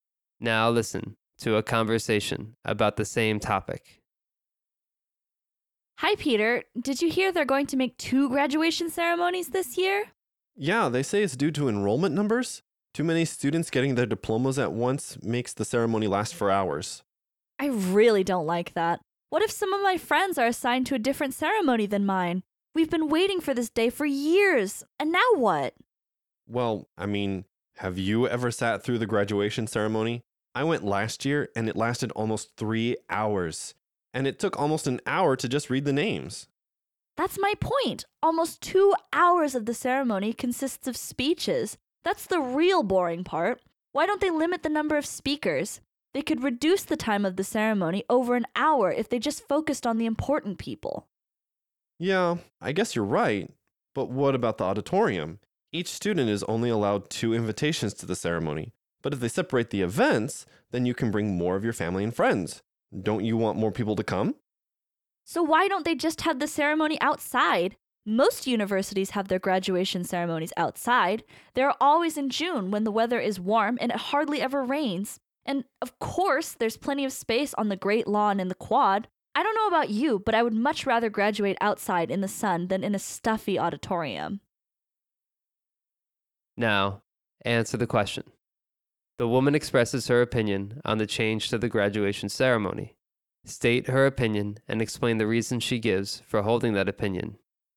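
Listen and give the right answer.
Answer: She opposes having two ceremonies (friends could be split up). The ceremony could be shortened by limiting the number of speakers, and holding it outside on the Great Lawn or the Quad would give room for more guests.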